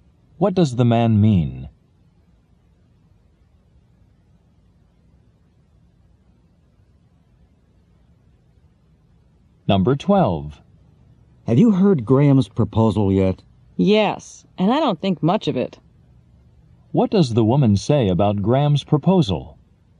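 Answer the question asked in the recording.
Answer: She doesn't think it is very good.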